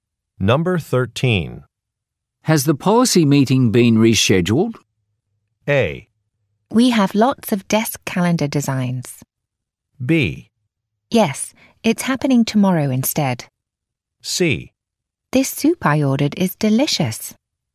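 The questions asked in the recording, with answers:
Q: Has the policy meeting been rescheduled?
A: B: Yes, it's happening tomorrow instead.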